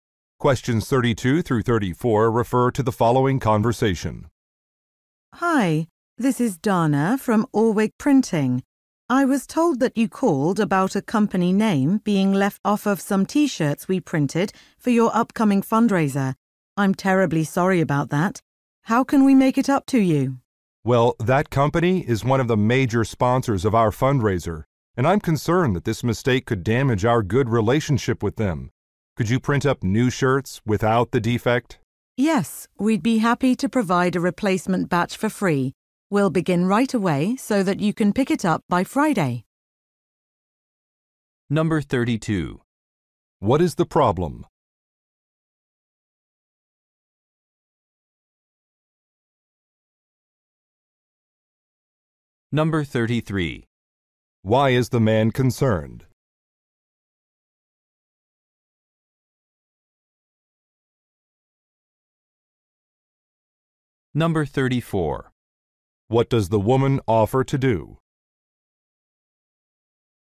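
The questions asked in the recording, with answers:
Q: What is the problem?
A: A company name was left off some T-shirts.

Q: Why is the man concerned?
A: The mistake could damage the relationship with a major sponsor.

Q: What does the woman offer to do?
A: Provide a free replacement batch of shirts.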